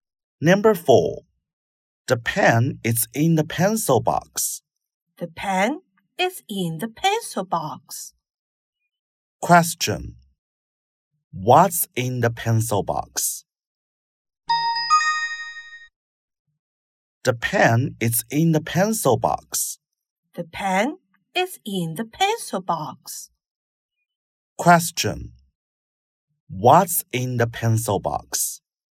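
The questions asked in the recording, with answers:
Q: What's in the pencil box?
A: The pen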